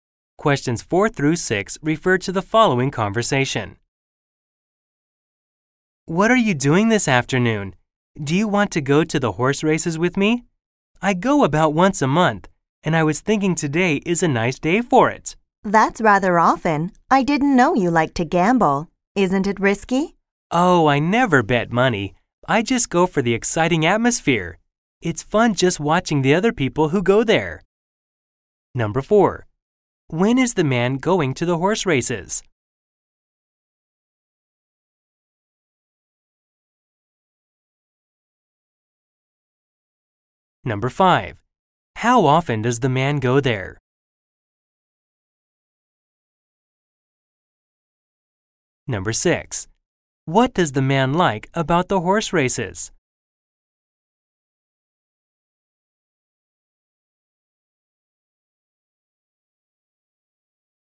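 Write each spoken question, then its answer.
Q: When is the man going to the horse races?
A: This afternoon

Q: How often does the man go there?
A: About once a month

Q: What does the man like about the horse races?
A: The exciting atmosphere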